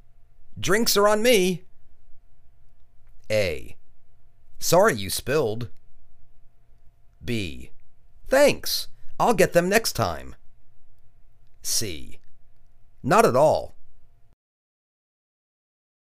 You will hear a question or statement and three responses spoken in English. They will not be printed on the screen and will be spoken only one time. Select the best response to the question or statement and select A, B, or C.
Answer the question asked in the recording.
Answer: Thanks, I'll get them next time.